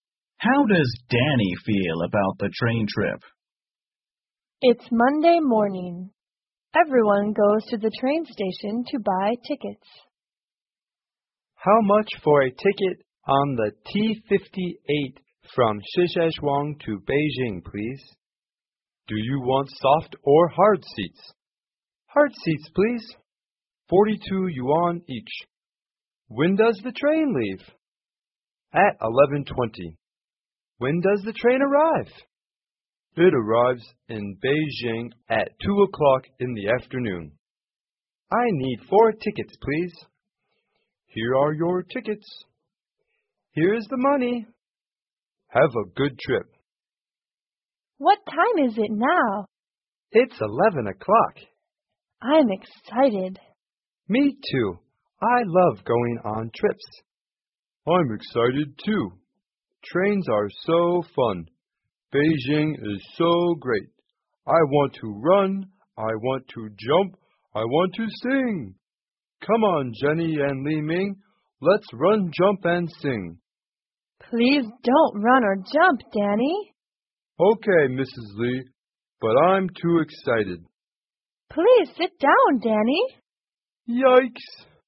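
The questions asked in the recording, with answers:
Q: How does Danny feel about the train trip?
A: He is excited.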